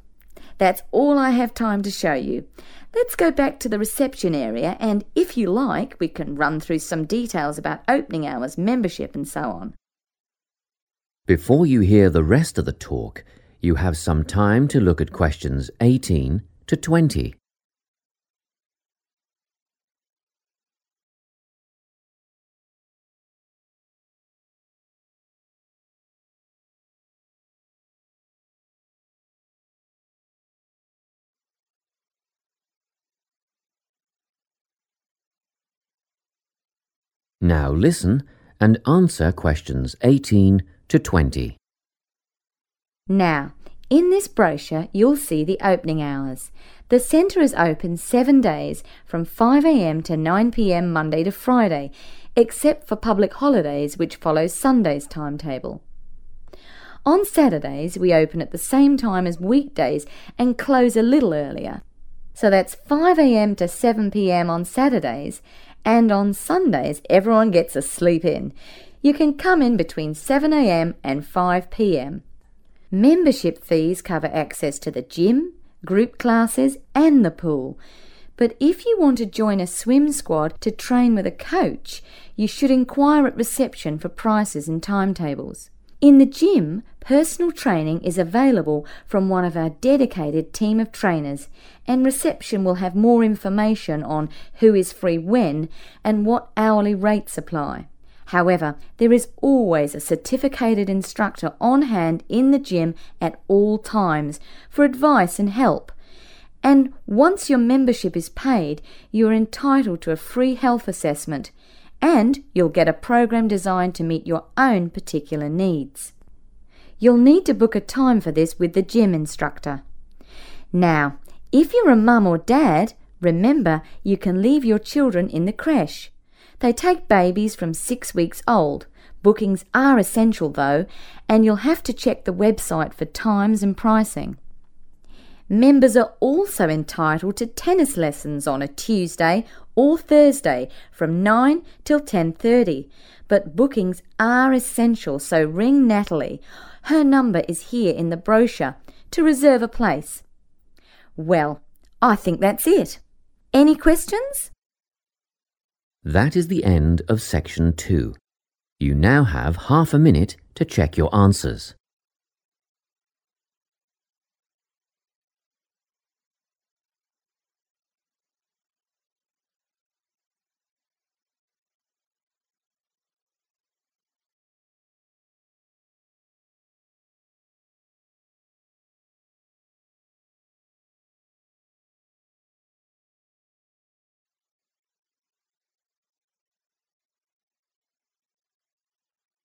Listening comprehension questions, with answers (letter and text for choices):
Choose the correct letter, A, B or C.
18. The sports centre is open on public holidays from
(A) 7 a.m. to 5 p.m.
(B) 5 a.m. to 7 p.m.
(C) 5 a.m. to 9 p.m.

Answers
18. (A) 7 a.m. to 5 p.m.

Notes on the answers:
The correct answer is A because the speaker explains that public holidays use the same schedule (timetable) as Sundays. The speaker then clarifies that on Sundays, the center opens later than on weekdays, at 7 a.m., and closes at 5 p.m. Therefore, those same hours apply to public holidays.

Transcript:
Let's go back to the reception area and, if you like, we can run through some details about opening hours, membership and so on.
Before you hear the rest of the talk, you have some time to look at questions 18 to 20.
Now listen and answer questions 18 to 20.
Now, in this brochure, you'll see the opening hours: the centre is open 7 days, from 5 a.m. Monday to Friday except for Public Holidays which follow Sunday's timetable. On Saturdays we open at the same time as weekdays and close a little earlier: so that's 5 a.m. on Saturdays; and on Sundays everyone gets a sleep-in - you can come in between 7 a.m.
Membership fees cover access to the gym, group classes and the pool but if you want to join a swim squad to train with a coach, you should enquire at reception for prices and timetables. In the gym, personal training is available from one of our dedicated team of trainers and reception will have more information on who is free when, and what hourly rates apply. However, there is always a certificated instructor on hand in the gym at all times for advice and help and once your membership is paid you are entitled to a free health assessment and you'll get a programme designed to meet your own particular needs. You'll need to book a time for this with the gym instructor. Now, if you're a mum or dad, remember you can leave your children in the crèche - they take babies from six weeks old - bookings are essential though and you'll have to check the website for times and pricing. Members are also entitled to tennis lessons on a Tuesday or Thursday from 9 till 10.30, but bookings are essential so ring Natalie (her number is here in the brochure) to reserve a place.
Well, I think that's it. Any questions?
That is the end of section 2. You now have half a minute to check your answers.